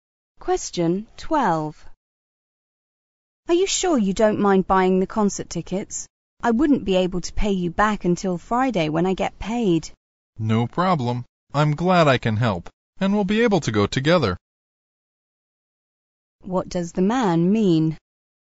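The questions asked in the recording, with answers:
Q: What does the man mean?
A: He is glad to buy the tickets and will wait until Friday to be paid back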